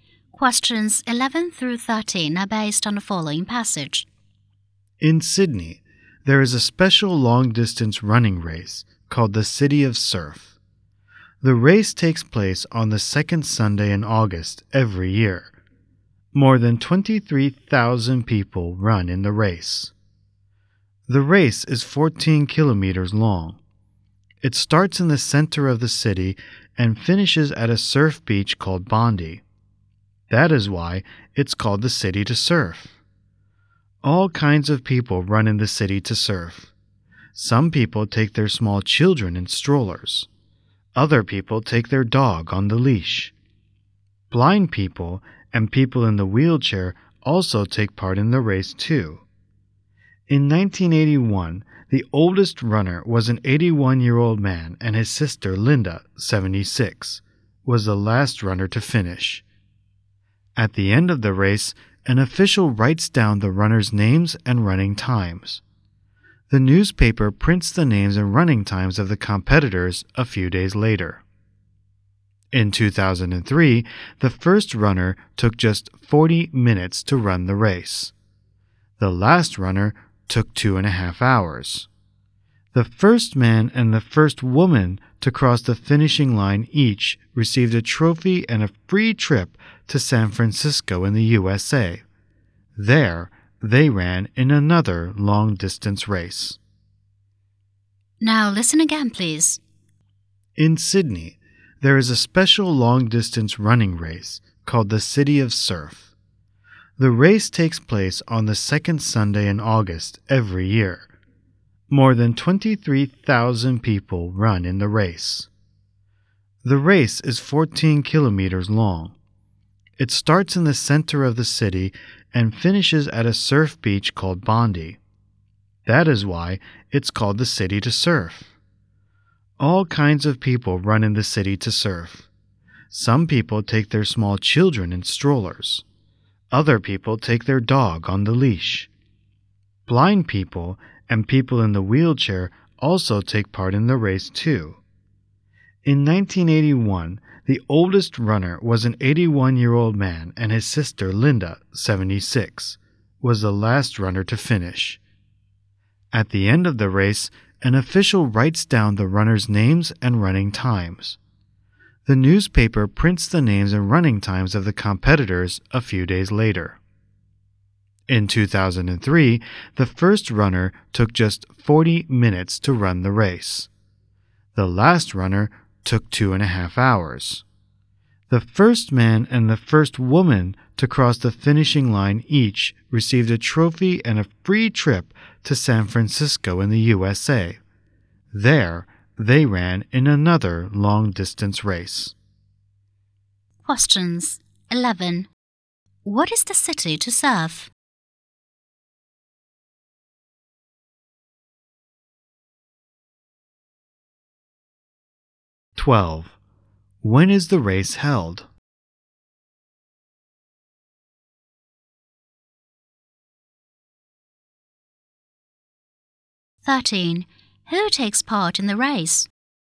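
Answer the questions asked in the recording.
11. A long-distance running race in Sydney
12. On the second Sunday in August every year
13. All kinds of people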